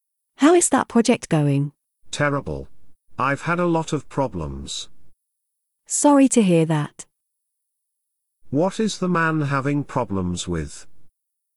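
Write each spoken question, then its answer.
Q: What is the man having problems with?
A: A project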